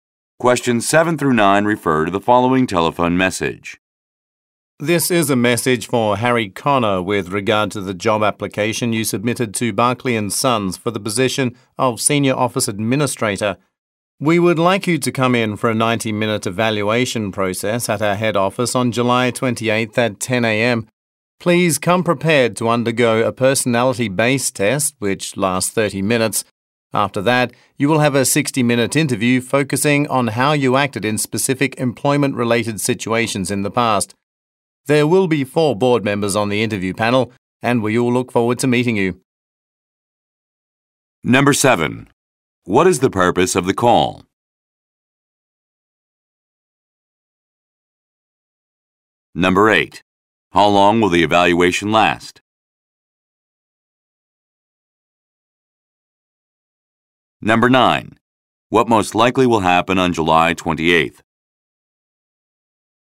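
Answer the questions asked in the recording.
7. To invite Harry Connor to a job evaluation (interview) at the head office
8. 90 minutes
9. Harry will take a personality test and have a job interview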